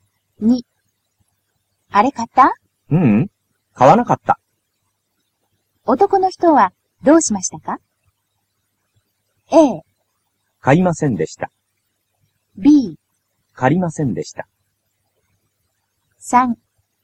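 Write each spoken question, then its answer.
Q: 男の人はどうしましたか?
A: A: 買いませんでした。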